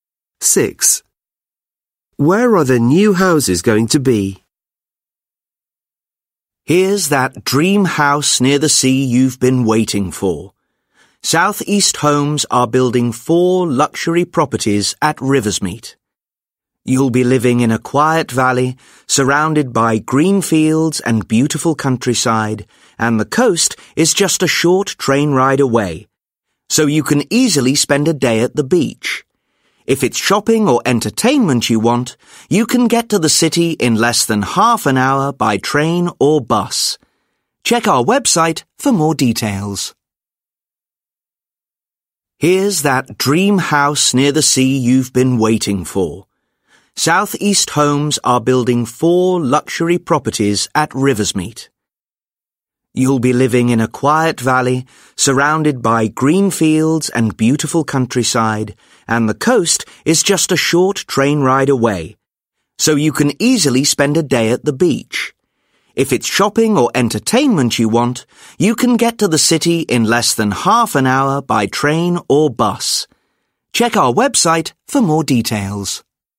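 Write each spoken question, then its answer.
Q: Where are the new houses going to be?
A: In a quiet valley in the countryside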